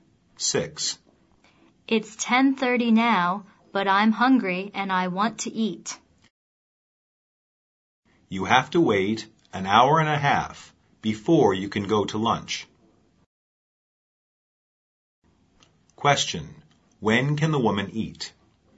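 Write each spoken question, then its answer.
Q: When can the woman eat?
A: At 12:00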